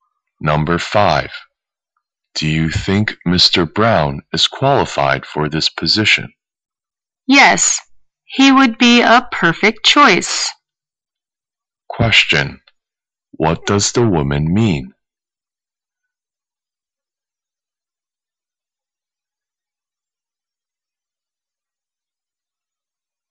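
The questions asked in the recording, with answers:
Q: What does the woman mean?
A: Mr. Brown would be a perfect choice for the position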